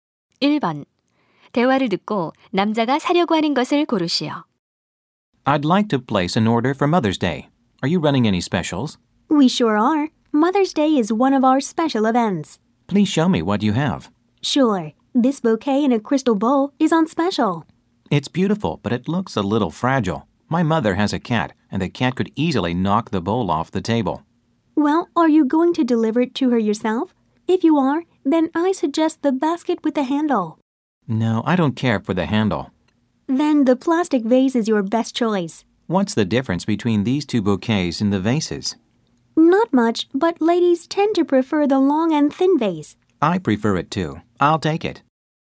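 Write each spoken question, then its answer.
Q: 대화를 듣고 남자가 사려고 하는 것을 고르시오.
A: 길고 가느다란 플라스틱 꽃병에 담긴 꽃다발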